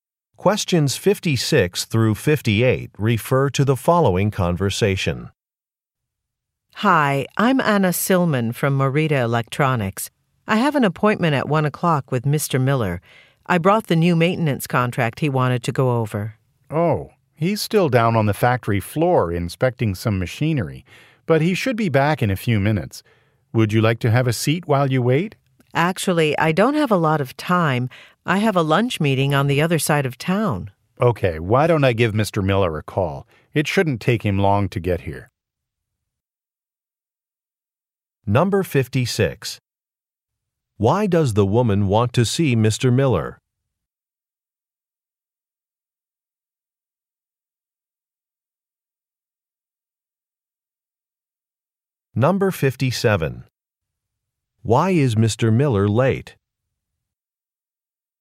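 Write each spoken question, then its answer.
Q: Why does the woman want to see Mr. Miller?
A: To go over a new maintenance contract

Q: Why is Mr. Miller late?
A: He is inspecting machinery on the factory floor

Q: What does the man say he will do?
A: Call Mr. Miller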